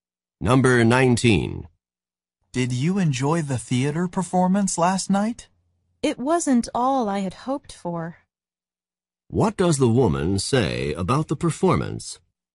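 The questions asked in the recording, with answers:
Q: What does the woman say about the performance?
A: It was disappointing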